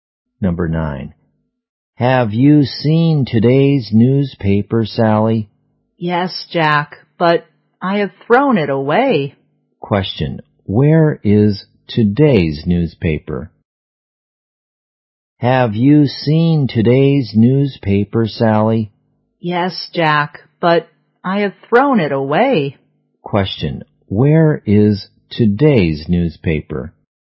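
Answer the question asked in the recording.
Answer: It has been thrown away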